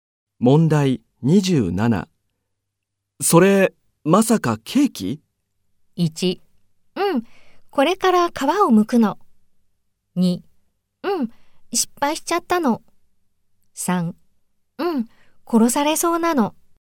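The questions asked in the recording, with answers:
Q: それ、まさかケーキ?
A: 2: うん、失敗しちゃったの。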